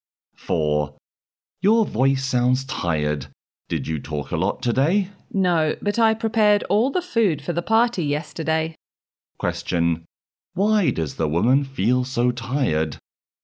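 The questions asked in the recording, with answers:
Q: Why does the woman feel so tired?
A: She prepared all the food for the party yesterday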